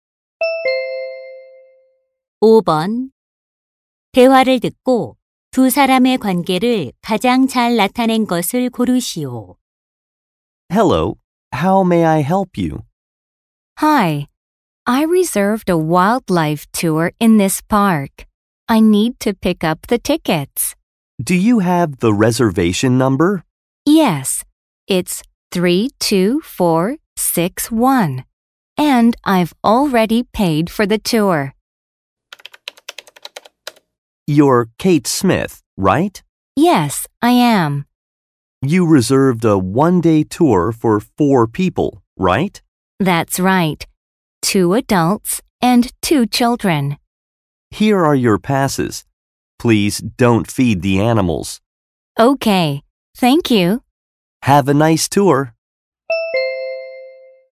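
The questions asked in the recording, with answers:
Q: 대화를 듣고 두 사람의 관계를 가장 잘 나타낸 것을 고르시오.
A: 공원 직원 - 관광객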